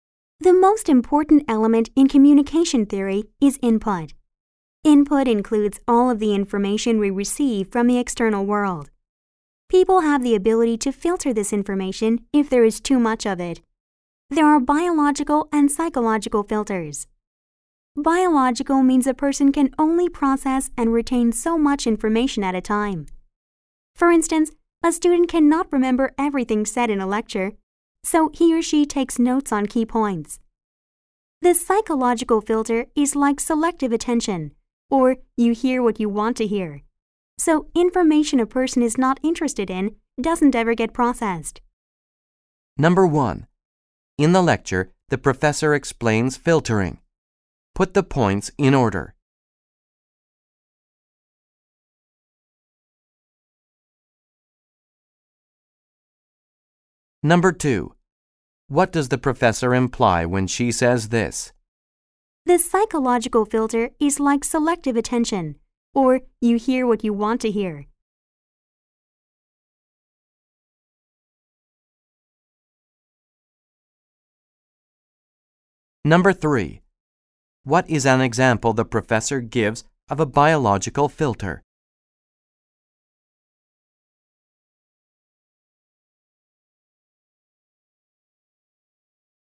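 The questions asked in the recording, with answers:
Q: What is an example the professor gives of a biological filter?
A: A student can't remember everything said in a lecture, so he or she takes notes on key points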